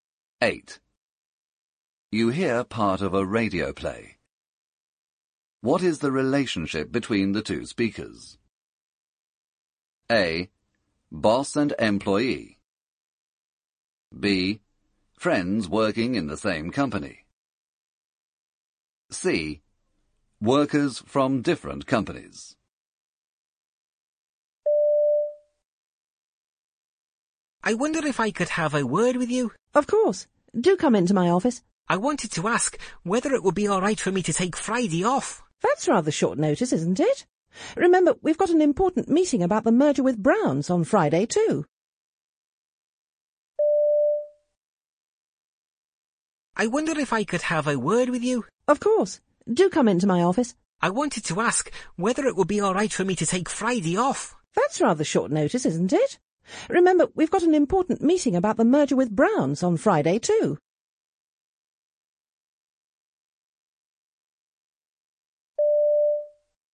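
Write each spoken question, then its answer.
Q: What is the relationship between the two speakers?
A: A: Boss and employee.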